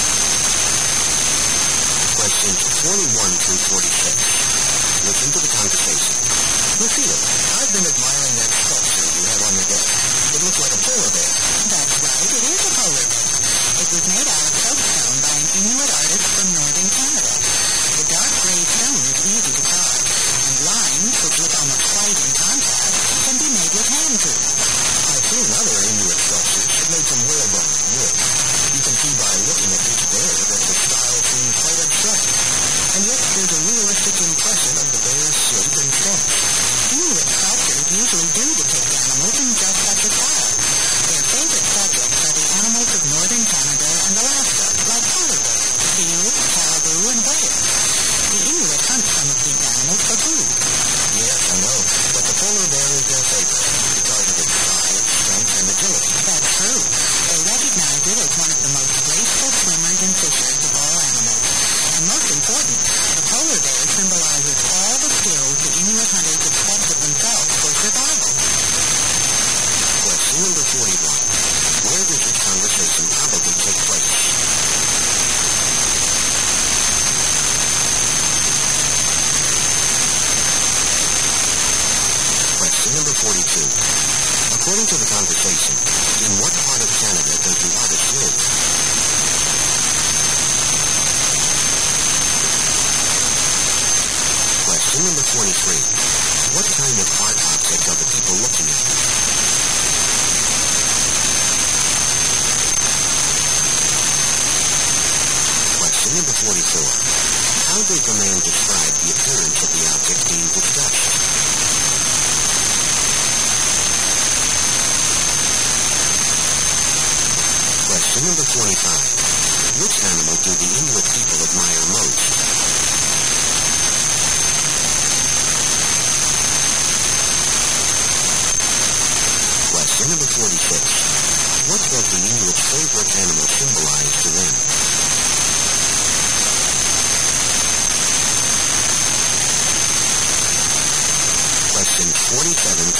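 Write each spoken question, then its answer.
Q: According to the conversation, in what part of Canada does the artist live?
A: Northern Canada

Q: What kind of art object are the people looking at?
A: A soapstone sculpture of a polar bear

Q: How does the man describe the appearance of the object being discussed?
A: Abstract in style, yet realistic

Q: Which animal do the Inuit people admire most?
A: The polar bear

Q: What does the Inuit's favorite animal symbolize to them?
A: The skills hunters need for survival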